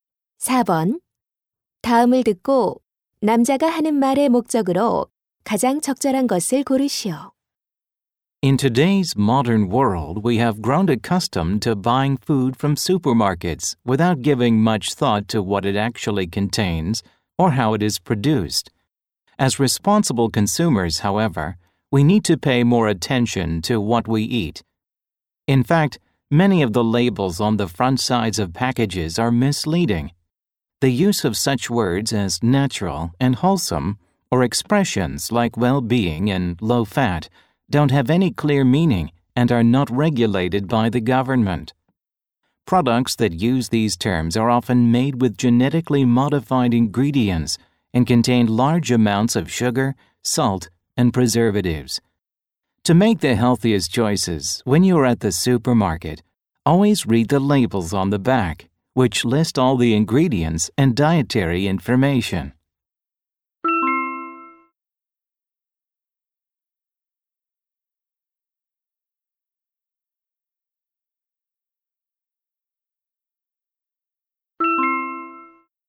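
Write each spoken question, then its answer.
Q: 다음을 듣고 남자가 하는 말의 목적으로 가장 적절한 것을 고르시오.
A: 식품 뒷면 라벨(성분·영양 정보)을 꼭 읽도록 권고하려고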